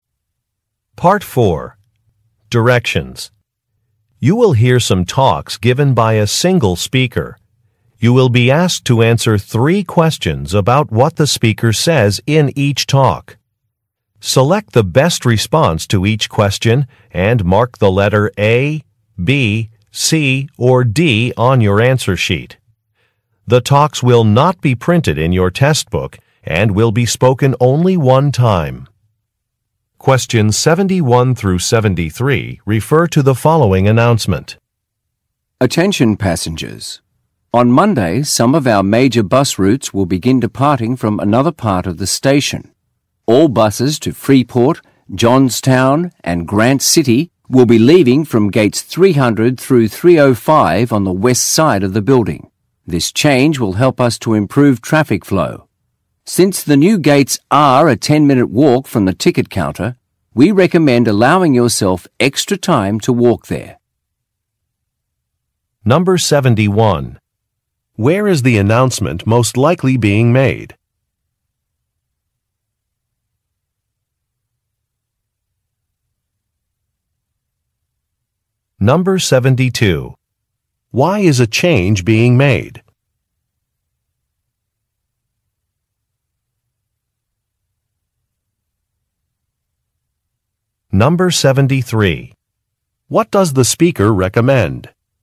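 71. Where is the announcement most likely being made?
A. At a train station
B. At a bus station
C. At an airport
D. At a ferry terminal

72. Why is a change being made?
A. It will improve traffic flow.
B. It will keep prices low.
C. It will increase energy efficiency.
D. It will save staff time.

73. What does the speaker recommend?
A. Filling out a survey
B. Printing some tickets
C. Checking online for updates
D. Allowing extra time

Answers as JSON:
{"71": "B", "72": "A", "73": "D"}

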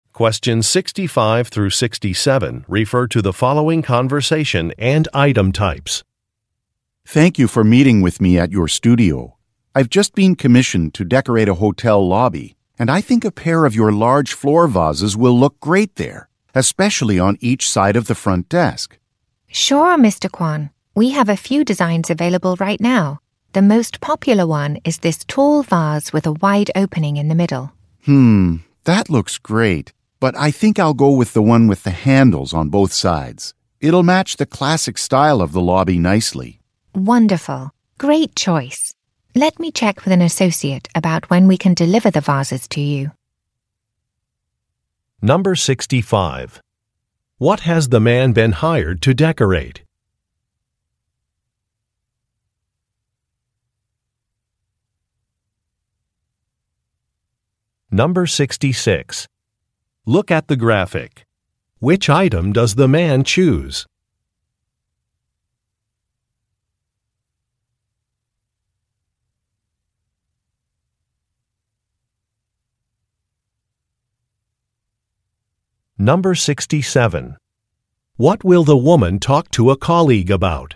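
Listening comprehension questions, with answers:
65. What has the man been hired to decorate?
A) A museum entrance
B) A client's office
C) A hotel lobby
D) A rooftop garden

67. What will the woman talk to a colleague about?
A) A delivery date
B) An employee discount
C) A payment method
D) A product substitution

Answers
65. C
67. A

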